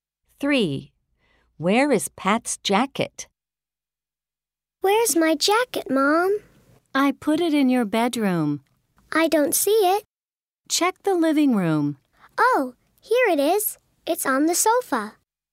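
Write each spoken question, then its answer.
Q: Where is Pat's jacket?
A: On the sofa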